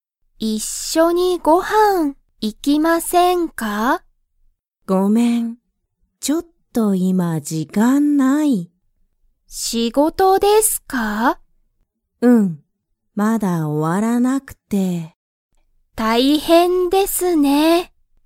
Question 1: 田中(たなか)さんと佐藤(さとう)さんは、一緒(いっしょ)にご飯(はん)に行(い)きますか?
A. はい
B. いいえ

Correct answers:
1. B. いいえ

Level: Level 1

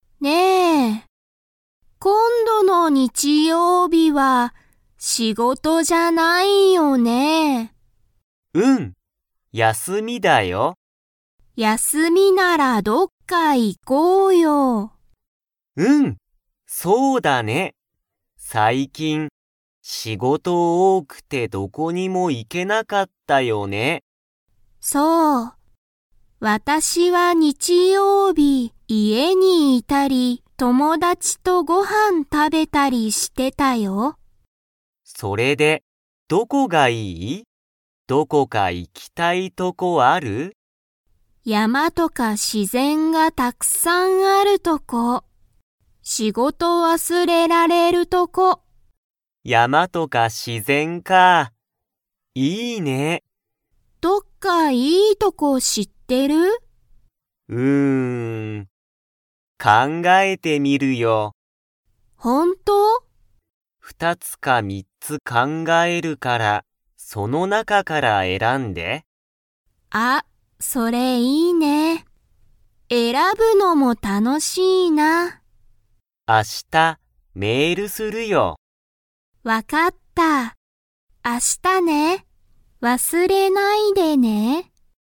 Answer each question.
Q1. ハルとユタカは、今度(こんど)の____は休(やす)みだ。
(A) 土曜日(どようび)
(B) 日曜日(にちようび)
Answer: (B) 日曜日(にちようび)

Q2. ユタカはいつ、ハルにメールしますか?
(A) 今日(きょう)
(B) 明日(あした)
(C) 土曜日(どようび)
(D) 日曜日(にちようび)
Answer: (B) 明日(あした)

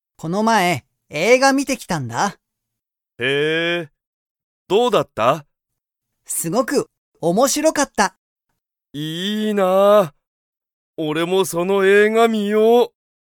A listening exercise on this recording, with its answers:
その映画(えいが)は、_____。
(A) あまり良(よ)くなかった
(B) すごく面白(おもしろ)かった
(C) 全然楽(ぜんぜんたの)しくなかった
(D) 少(すこ)し新(あたら)しかった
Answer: (B) すごく面白(おもしろ)かった

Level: Level 1

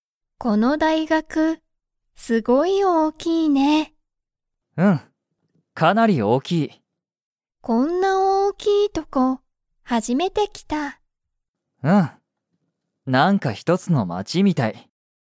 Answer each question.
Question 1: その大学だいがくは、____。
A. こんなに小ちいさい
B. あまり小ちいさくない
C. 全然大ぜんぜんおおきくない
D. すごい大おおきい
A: D. すごい大おおきい

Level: Level 1

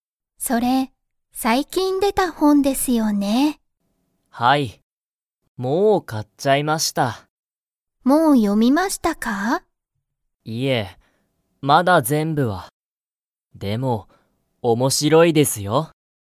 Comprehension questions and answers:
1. 鈴木すずきさんは、その本ほんを全部読ぜんぶよみましたか?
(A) はい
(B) いいえ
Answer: (B) いいえ

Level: Level 1

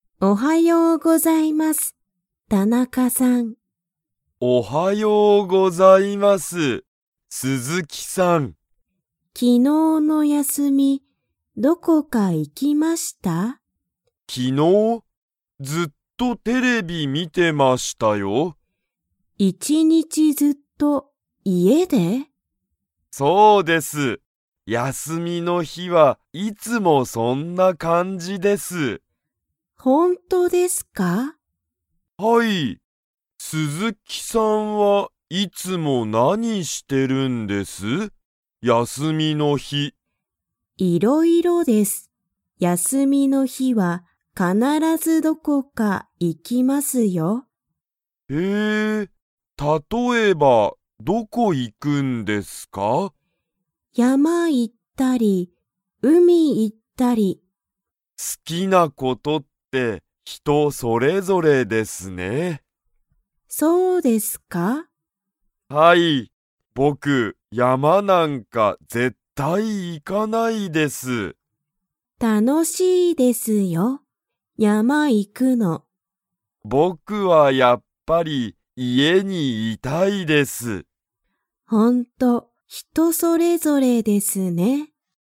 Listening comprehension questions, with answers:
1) 昨日(きのう)の休(やす)み、田中(たなか)さんは____を観(み)ていた。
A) スマホ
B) 山(やま)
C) 海(うみ)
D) テレビ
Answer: D) テレビ

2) 鈴木(すずき)さんは、休(やす)みの日(ひ)は必(かなら)ずどこかに行(い)きますか?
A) はい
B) いいえ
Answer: A) はい

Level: Level 2

